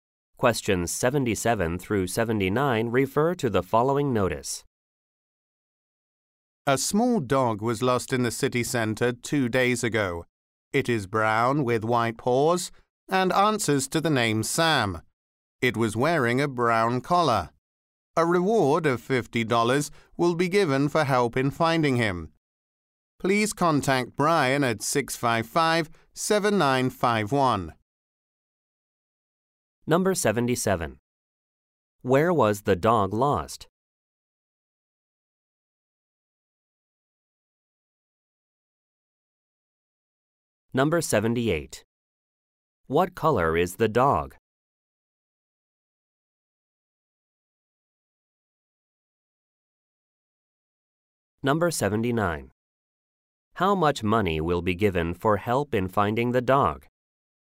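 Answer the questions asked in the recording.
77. In the city center
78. Brown with white paws
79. $50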